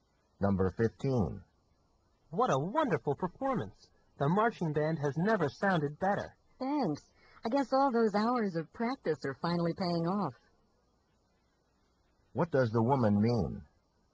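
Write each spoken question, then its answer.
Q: What does the woman mean?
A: The band's practice is paying off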